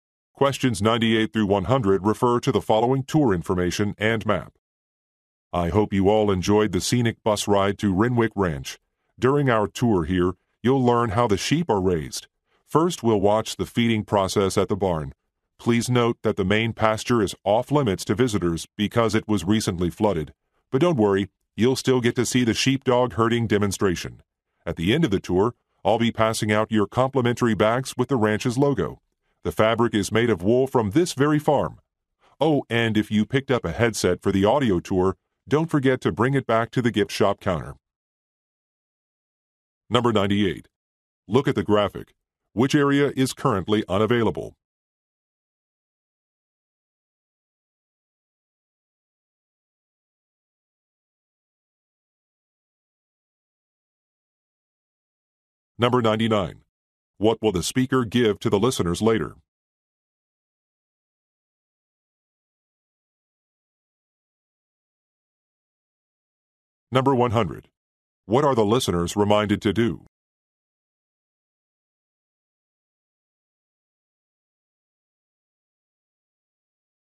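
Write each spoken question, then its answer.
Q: What will the speaker give to the listeners later?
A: Complimentary bags with the ranch's logo

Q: What are the listeners reminded to do?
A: Return their headsets to the gift shop counter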